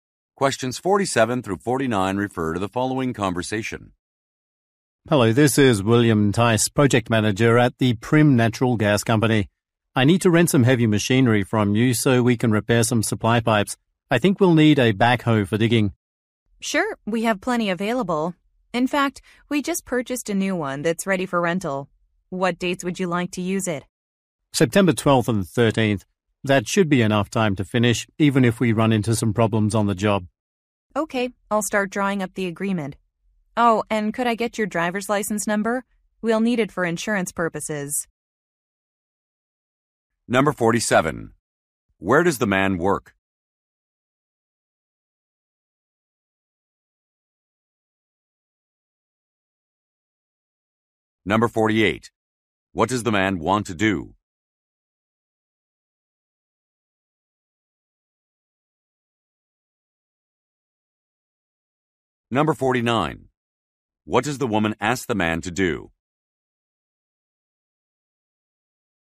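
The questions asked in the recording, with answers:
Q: Where does the man work?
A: At the Prim Natural Gas Company

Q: What does the man want to do?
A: Rent a backhoe

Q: What does the woman ask the man to do?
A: Give his driver's license number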